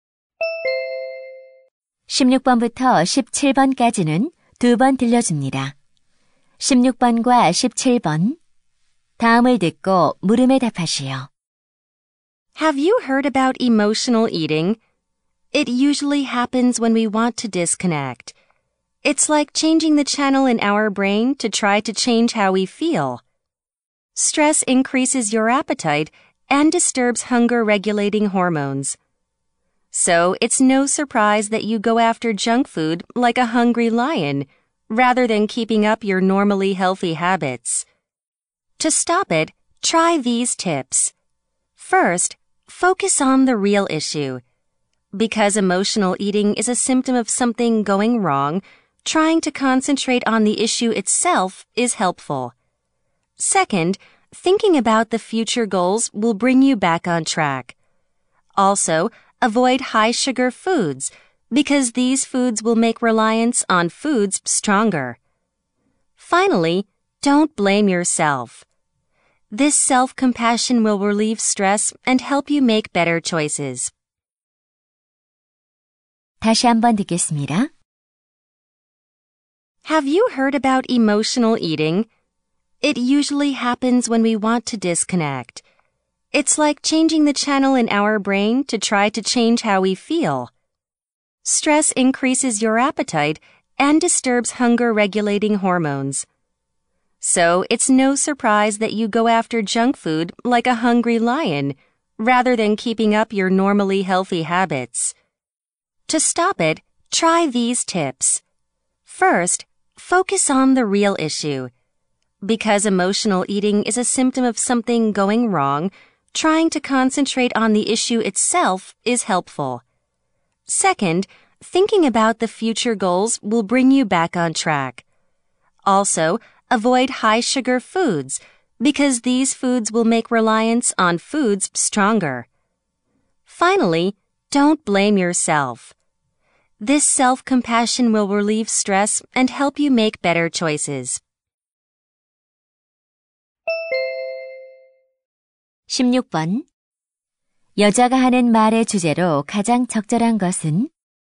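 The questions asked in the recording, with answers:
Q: 여자가 하는 말의 주제로 가장 적절한 것은?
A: 감정적 식사를 멈추는 방법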